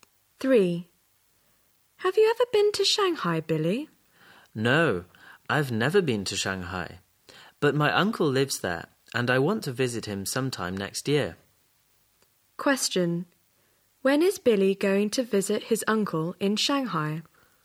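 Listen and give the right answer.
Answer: Sometime next year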